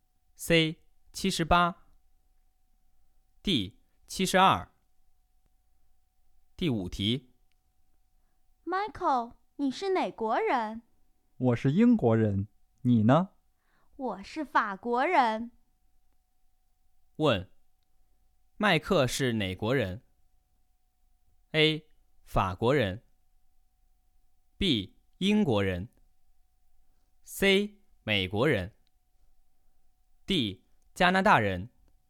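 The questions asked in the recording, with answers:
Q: 问,麦克是哪国人?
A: B: 英国人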